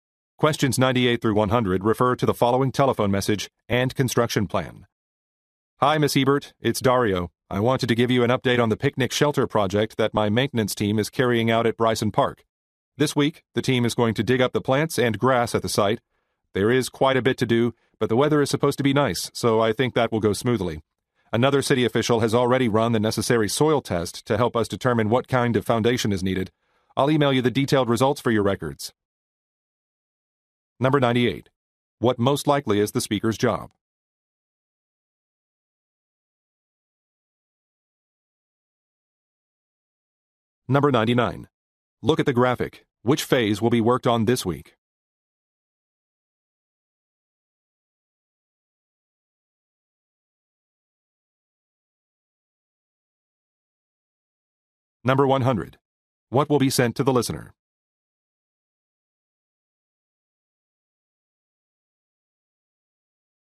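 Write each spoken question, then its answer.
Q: What will be sent to the listener?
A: Soil test results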